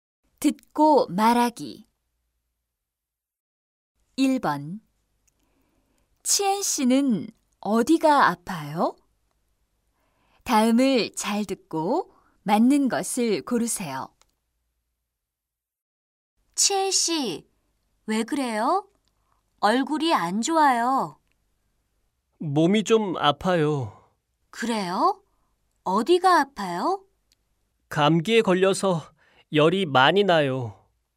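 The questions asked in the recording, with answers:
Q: 치엔 씨는 어디가 아파요?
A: 감기에 걸려서 열이 많이 나요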